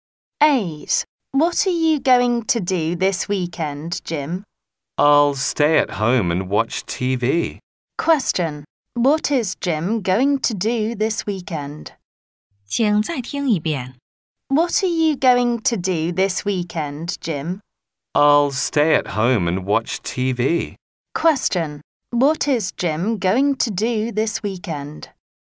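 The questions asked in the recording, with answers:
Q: What is Jim going to do this weekend?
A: Stay at home and watch TV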